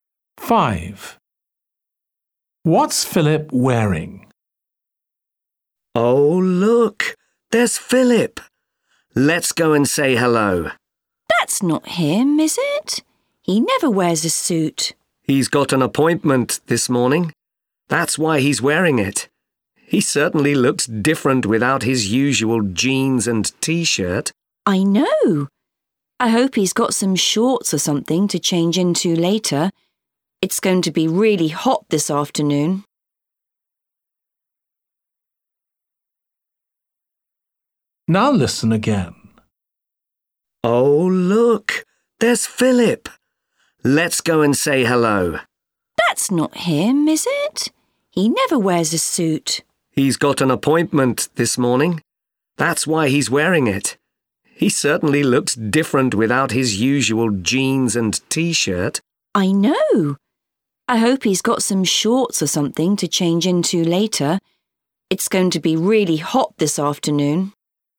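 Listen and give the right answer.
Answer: a suit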